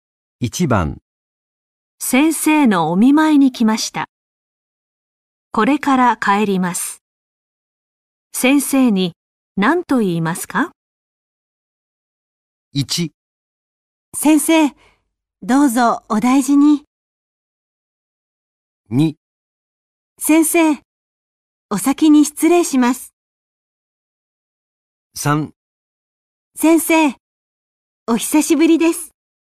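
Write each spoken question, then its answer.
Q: 先生のお見舞いに来ました。これから帰ります。先生に何と言いますか?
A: 1: 先生、どうぞお大事に。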